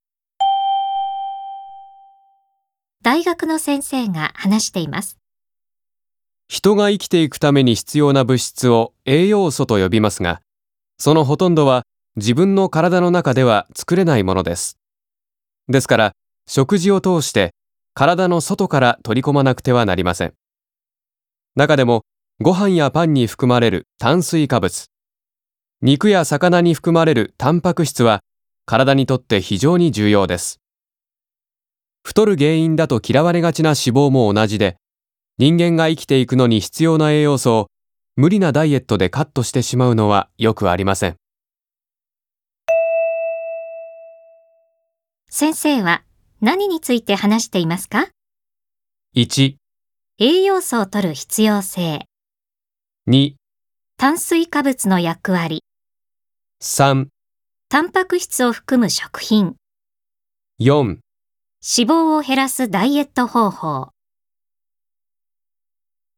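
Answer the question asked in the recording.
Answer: 1: 栄養素を摂る必要性。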